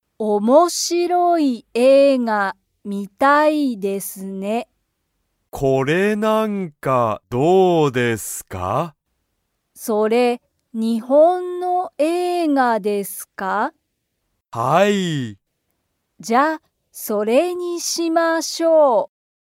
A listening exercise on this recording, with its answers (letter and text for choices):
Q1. ヨウコは____映画(えいが)を観(み)たい。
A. 面白(おもしろ)い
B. すごい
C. おいしい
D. きれいな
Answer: A. 面白(おもしろ)い

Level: Level 1